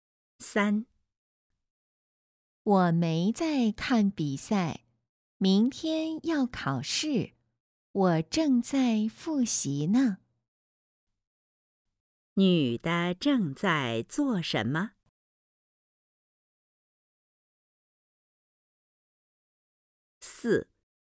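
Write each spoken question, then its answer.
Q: 女的正在做什么?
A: 复习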